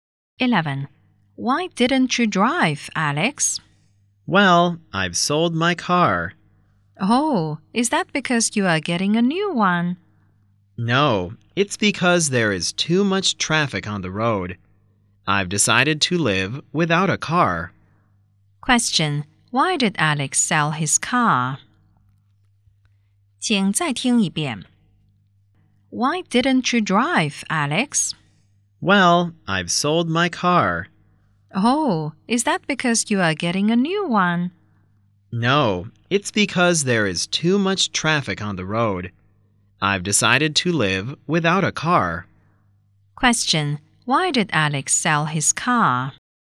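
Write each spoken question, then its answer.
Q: Why did Alex sell his car?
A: Because there is too much traffic on the road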